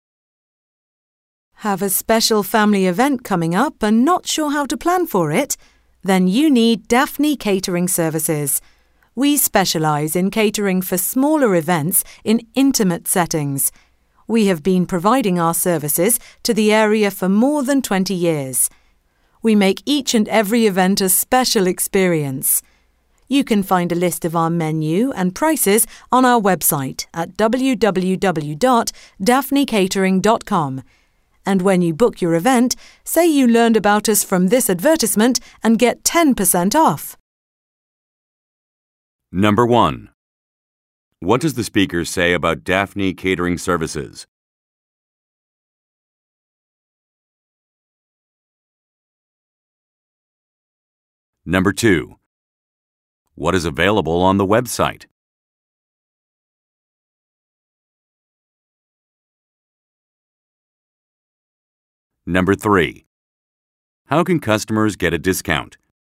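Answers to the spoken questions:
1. It specialises in catering for smaller events and has served the area for more than 20 years
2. A list of the menu and prices
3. By saying they learned about the company from this advertisement when booking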